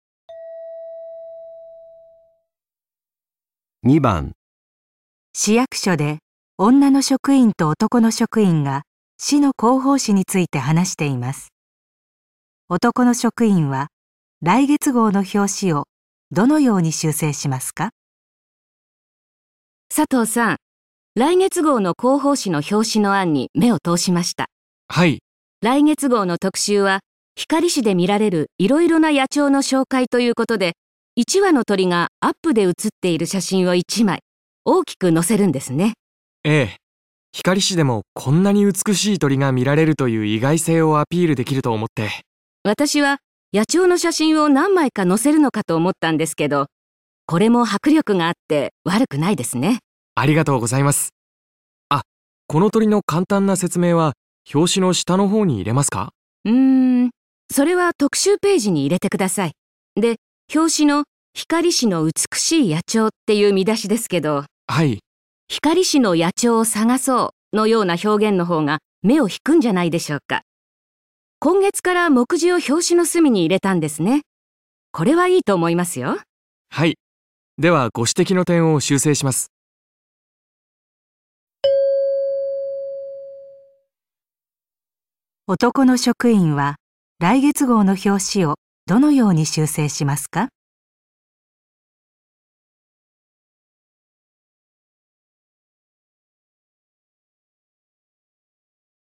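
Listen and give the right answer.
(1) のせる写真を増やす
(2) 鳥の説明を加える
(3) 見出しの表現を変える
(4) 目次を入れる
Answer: (3) 見出しの表現を変える

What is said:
男:はい。
女:「光市の野鳥を探そう」 のような表現の方が目を引くんじゃないでしょうか。 今月から目次を表紙の隅に入れたんですね。 これはいいと思いますよ。
男:はい、ではご指摘の点を修正します。
男の職員は来月号の表紙をどのように修正しますか。

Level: N1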